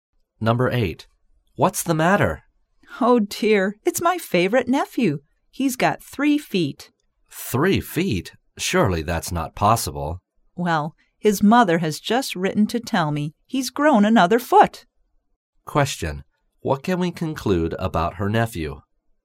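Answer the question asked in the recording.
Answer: He has grown a foot taller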